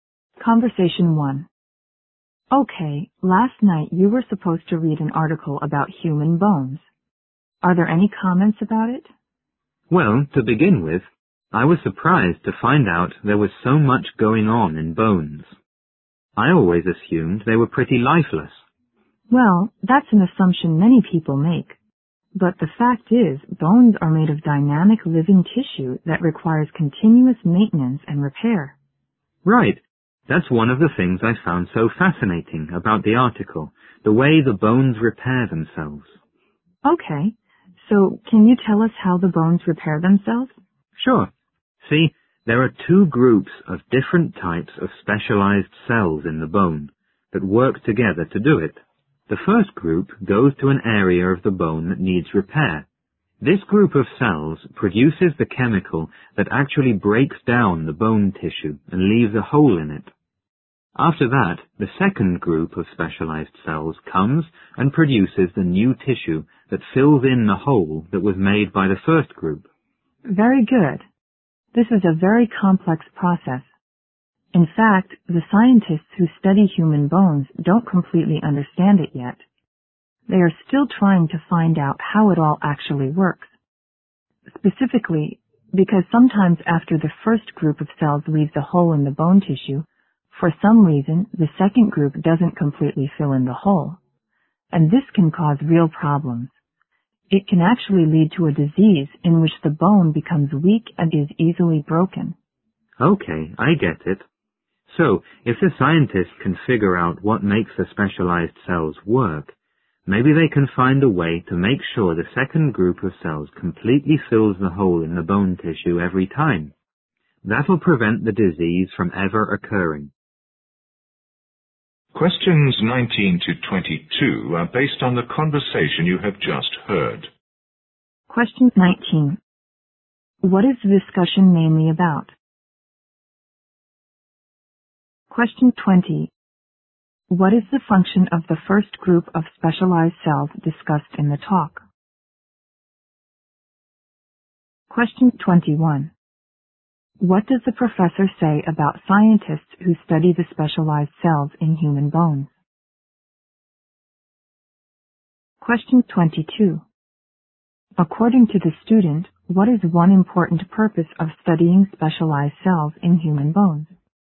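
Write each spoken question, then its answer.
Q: What is the discussion mainly about?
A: How human bones repair themselves

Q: What is the function of the first group of specialized cells discussed in the talk?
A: To break down bone tissue, leaving a hole

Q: What does the professor say about scientists who study the specialized cells in human bones?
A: They don't completely understand the process yet

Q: According to the student, what is one important purpose of studying specialized cells in human bones?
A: To prevent a disease that makes bones weak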